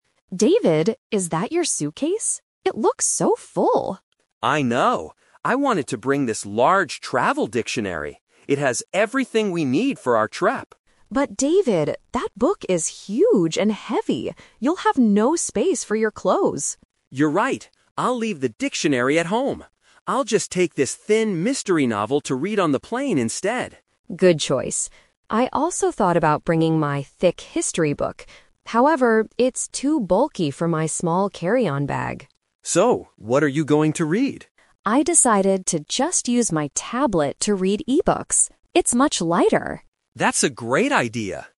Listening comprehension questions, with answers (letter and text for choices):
Listen to the conversation between a husband and wife. Choose the correct answer A, B, or C.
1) What did David originally want to bring?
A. A thin mystery novel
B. A large travel dictionary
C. A tablet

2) Why did Mary tell David to leave his book at home?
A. Because he doesn't like reading.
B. Because it is too heavy and large.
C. Because she already has a dictionary.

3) What will Mary read on the plane?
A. A thick history book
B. A mystery novel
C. E-books on her tablet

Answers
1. B. A large travel dictionary
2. B. Because it is too heavy and large.
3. C. E-books on her tablet

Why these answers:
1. David says, "I wanted to bring this large travel dictionary." Option A is what he chose after changing his mind. Option C is what Mary is using.
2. Mary says, "But David, that book is huge and heavy!" and points out there will be no space for clothes. Options A and C are not mentioned in the dialogue.
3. This is the "final result" trap. Mary mentions a "thick history book" (Option A), but then uses "However" to say it's too bulky. She finally says, "I decided to just use my tablet to read e-books." Option B is what David is bringing, not Mary.

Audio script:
Mary: David, is that your suitcase? It looks so full!
David: I know. I wanted to bring this large travel dictionary. It has everything we need for our trip.
Mary: But David, that book is huge and heavy! You'll have no space for your clothes.
David: You're right. I'll leave the dictionary at home. I'll just take this thin mystery novel to read on the plane instead.
Mary: Good choice. I also thought about bringing my thick history book. However, it's too bulky for my small carry-on bag.
David: So, what are you going to read?
Mary: I decided to just use my tablet to read e-books. It's much lighter!